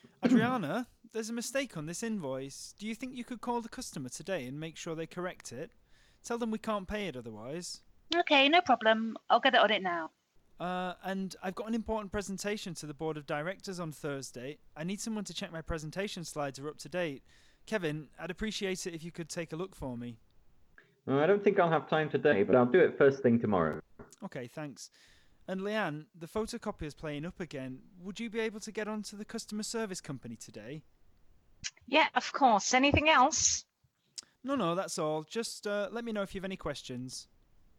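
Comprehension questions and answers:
Look at the quiz below to choose the polite language from the audio above when delegating:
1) "...there's a mistake on this invoice, ______________ call the customer today and make sure they correct it, tell them we can't pay it otherwise.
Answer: do you think you could

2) "No problem, _____________ it now".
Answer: I'll get on

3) ..."I need someone to check my presentation slides are up to date, Kevin,__________________ take a look for me".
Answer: I'd appreciate it if you could

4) "....______________ have time today, but I'll do it first thing tomorrow".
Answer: I don't think I'll

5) "...the photocopier's playing up again, _____________ get on to the service company today?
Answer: would you be able to

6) "Yes, _________. Anything else?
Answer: of course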